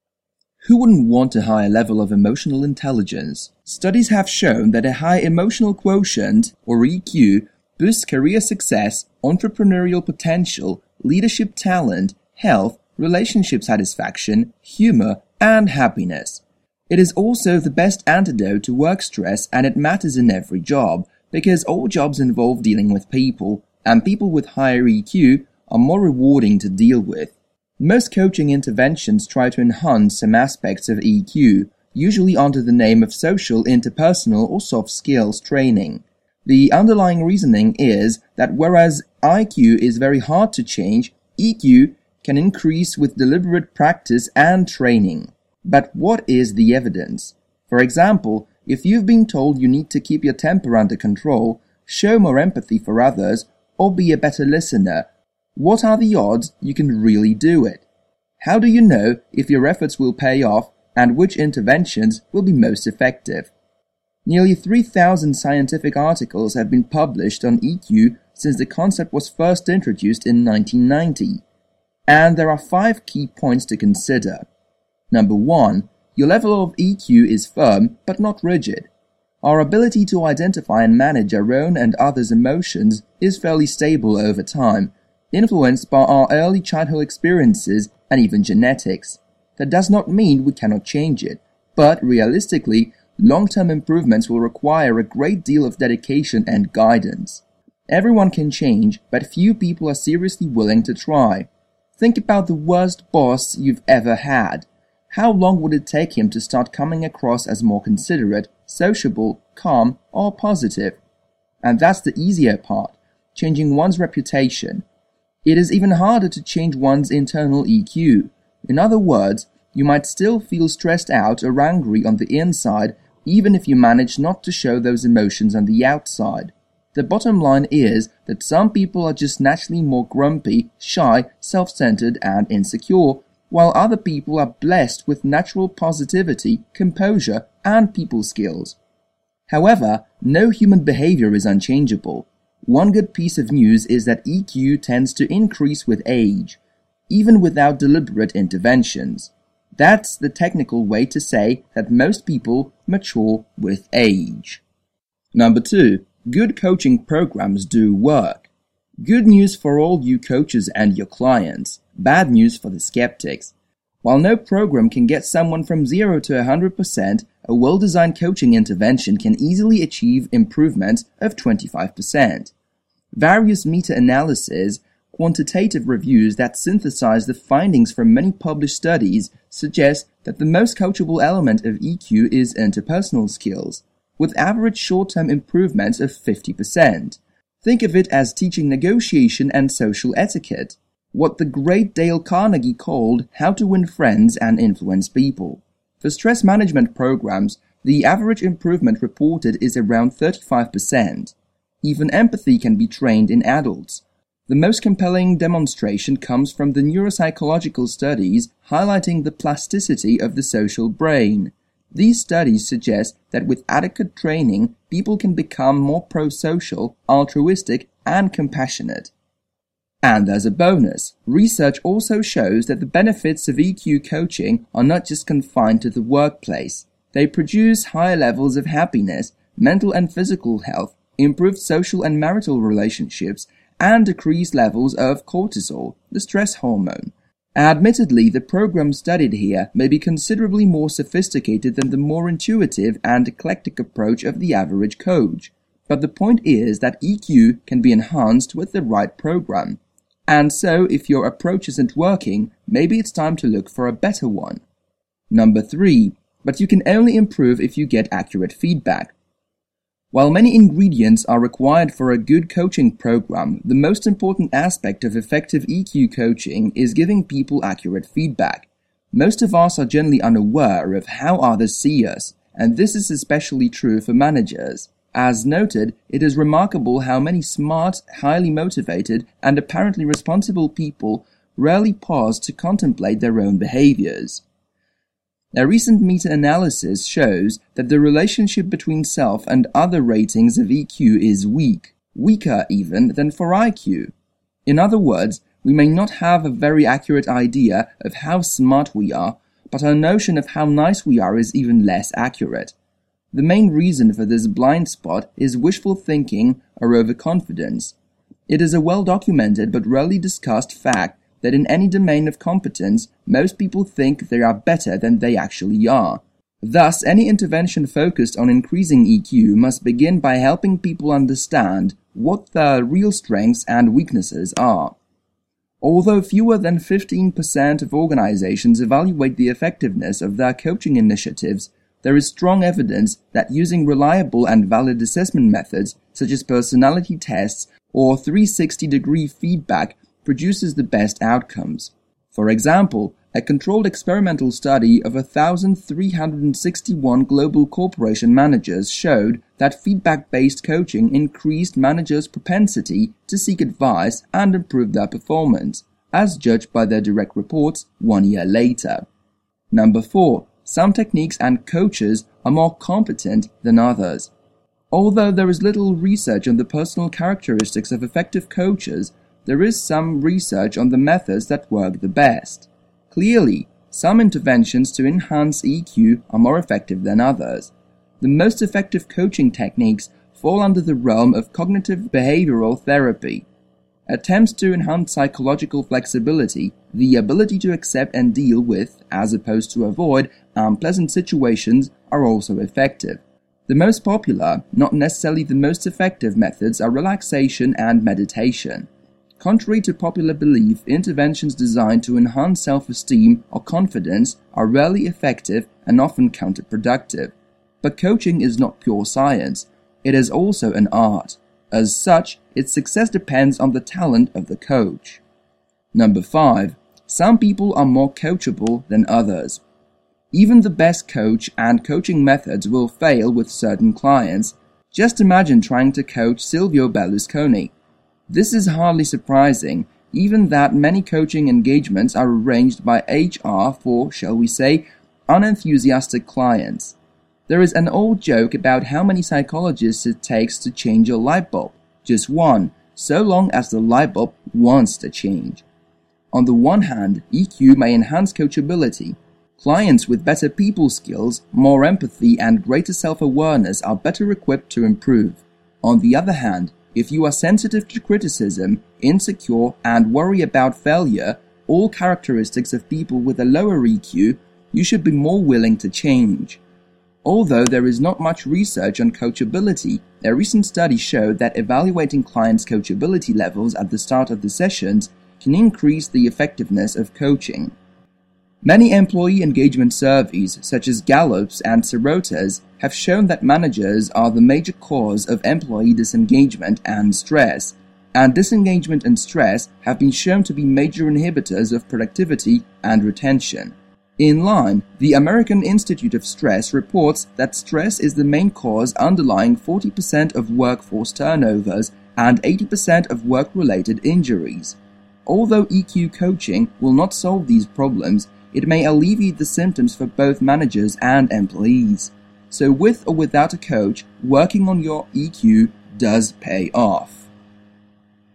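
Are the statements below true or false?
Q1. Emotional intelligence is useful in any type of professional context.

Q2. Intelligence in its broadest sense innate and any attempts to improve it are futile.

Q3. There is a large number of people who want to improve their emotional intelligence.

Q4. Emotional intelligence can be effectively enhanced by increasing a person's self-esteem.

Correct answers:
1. True
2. False
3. False
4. False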